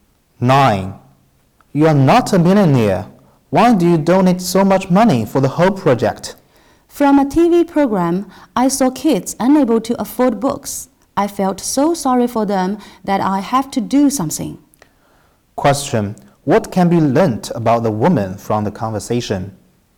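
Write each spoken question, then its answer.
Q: What can be learnt about the woman from the conversation?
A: She is kind-hearted and donated to help kids who can't afford books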